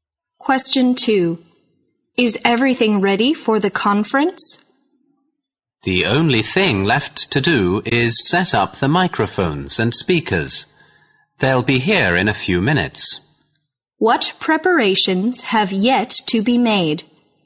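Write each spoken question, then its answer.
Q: What preparations have yet to be made?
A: Setting up the microphones and speakers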